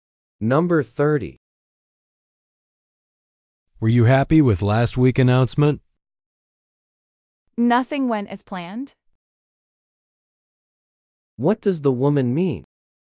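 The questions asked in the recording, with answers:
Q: What does the woman mean?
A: She was not happy; nothing went as planned.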